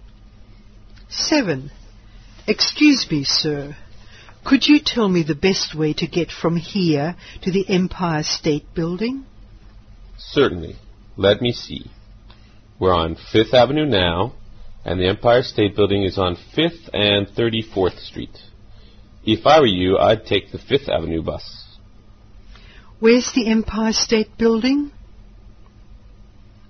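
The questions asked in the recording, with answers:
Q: Where's the Empire State Building?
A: On 5th Avenue and 34th Street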